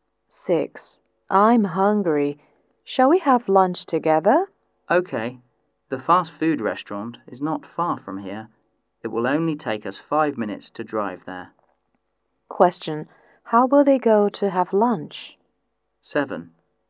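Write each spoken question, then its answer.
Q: how will they go to have lunch?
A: By car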